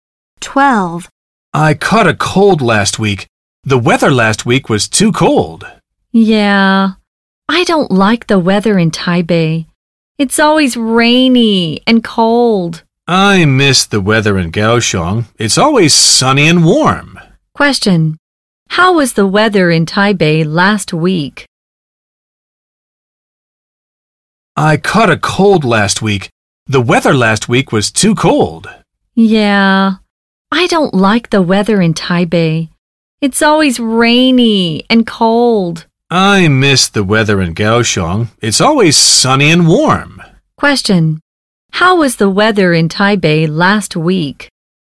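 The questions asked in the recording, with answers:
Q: How was the weather in Taipei last week?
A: Rainy and cold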